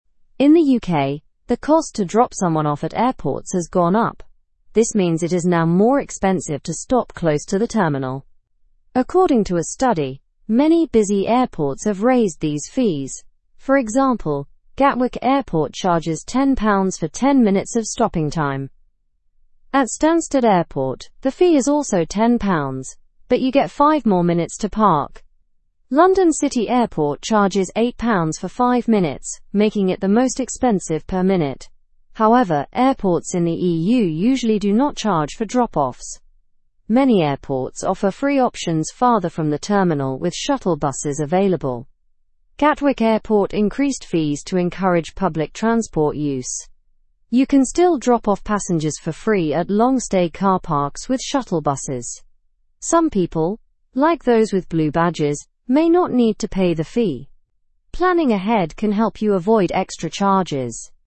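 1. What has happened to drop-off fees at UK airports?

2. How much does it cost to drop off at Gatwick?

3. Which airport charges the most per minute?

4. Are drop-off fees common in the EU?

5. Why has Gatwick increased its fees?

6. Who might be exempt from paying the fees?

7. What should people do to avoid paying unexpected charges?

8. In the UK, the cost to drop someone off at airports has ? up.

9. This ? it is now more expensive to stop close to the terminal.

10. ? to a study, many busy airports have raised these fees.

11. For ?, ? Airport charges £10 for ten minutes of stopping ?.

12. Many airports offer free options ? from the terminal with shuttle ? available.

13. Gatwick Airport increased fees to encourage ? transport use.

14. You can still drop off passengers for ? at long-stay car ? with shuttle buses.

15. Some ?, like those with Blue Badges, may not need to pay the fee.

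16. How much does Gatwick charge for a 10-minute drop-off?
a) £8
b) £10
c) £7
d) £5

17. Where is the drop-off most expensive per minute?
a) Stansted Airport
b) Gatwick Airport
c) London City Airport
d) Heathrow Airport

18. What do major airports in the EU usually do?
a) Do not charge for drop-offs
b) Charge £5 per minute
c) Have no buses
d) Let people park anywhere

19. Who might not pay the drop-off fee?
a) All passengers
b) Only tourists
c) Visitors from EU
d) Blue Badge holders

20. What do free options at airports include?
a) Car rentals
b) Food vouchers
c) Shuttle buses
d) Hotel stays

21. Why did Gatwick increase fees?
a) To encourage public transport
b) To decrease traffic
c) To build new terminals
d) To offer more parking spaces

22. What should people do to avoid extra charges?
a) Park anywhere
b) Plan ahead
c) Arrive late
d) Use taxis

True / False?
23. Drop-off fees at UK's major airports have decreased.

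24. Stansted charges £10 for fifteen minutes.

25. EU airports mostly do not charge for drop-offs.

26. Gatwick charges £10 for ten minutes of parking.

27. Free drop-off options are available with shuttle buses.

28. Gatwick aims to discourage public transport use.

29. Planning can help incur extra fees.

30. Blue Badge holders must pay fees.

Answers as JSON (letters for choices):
{"1": "The fees have increased.", "2": "£10 for ten minutes.", "3": "London City Airport.", "4": "No, most EU airports do not charge.", "5": "To encourage public transport use.", "6": "Blue Badge holders.", "7": "Plan ahead.", "8": "gone", "9": "means", "10": "According", "11": "example; Gatwick; time", "12": "farther; buses", "13": "public", "14": "free; parks", "15": "people", "16": "b", "17": "c", "18": "a", "19": "d", "20": "c", "21": "a", "22": "b", "23": "False", "24": "True", "25": "True", "26": "True", "27": "True", "28": "False", "29": "False", "30": "False"}

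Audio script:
In the UK, the cost to drop someone off at airports has gone up. This means it is now more expensive to stop close to the terminal. According to a study, many busy airports have raised these fees. For example, Gatwick Airport charges £10 for ten minutes of stopping time.
At Stansted Airport, the fee is also £10, but you get five more minutes to park. London City Airport charges £8 for five minutes, making it the most expensive per minute. However, airports in the EU usually do not charge for drop-offs. Many airports offer free options farther from the terminal with shuttle buses available.
Gatwick Airport increased fees to encourage public transport use. You can still drop off passengers for free at long-stay car parks with shuttle buses. Some people, like those with Blue Badges, may not need to pay the fee. Planning ahead can help you avoid extra charges.

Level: Level 2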